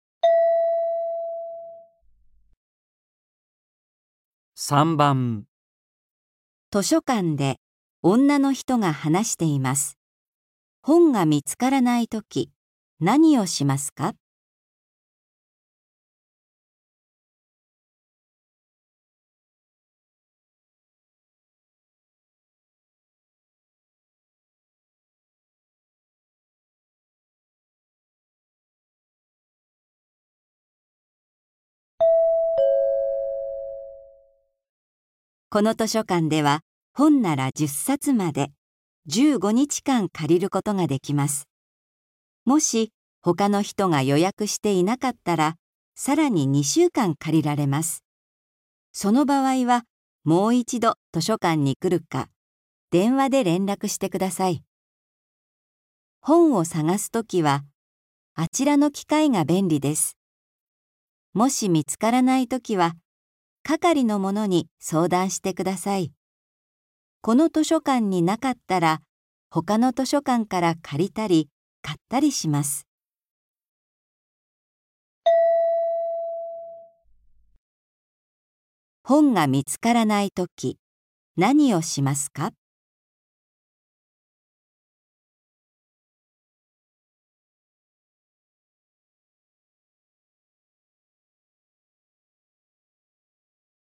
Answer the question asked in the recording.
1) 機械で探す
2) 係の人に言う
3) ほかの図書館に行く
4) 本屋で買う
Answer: 2) 係の人に言う

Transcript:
F:この図書館では本なら10冊まで、15日間借りることができます。もし、ほかの人が予約していなかったら、さらに2週間借りられます。その場合は、もう一度図書館に来るか、電話で連絡してください。本を探すときは、あちらの機械が便利です。もし見つからないときは、係の者に相談してください。この図書館になかったら、ほかの図書館から借りたり、買ったりします。
本が見つからないとき、何をしますか。

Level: 初級